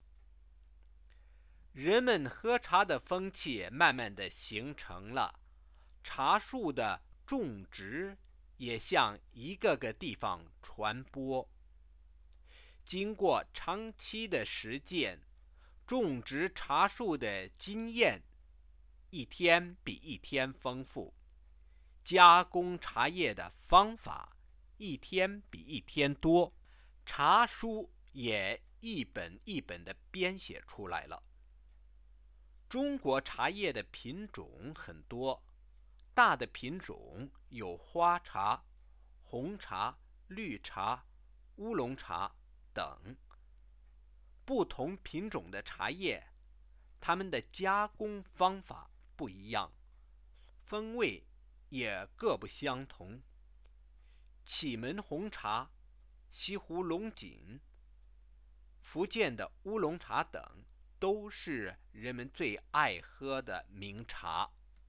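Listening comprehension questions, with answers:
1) What happened after tea-drinking becoming a habit in China?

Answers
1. Tea planting spread to many places, experience in growing and processing tea grew, and books on tea were written.

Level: 2nd year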